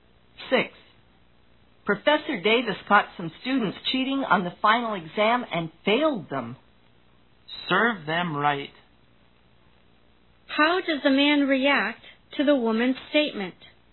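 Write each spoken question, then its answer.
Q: How does the man react to the woman's statement?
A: He thinks the students deserved to fail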